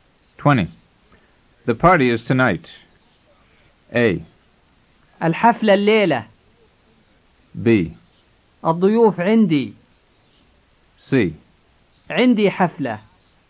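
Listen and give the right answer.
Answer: A: الحفلة الليلة.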